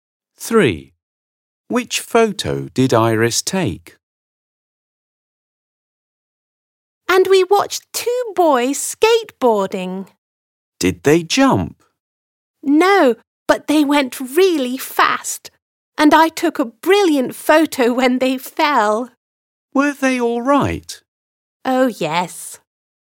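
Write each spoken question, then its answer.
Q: Which photo did Iris take?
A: two boys falling off their skateboards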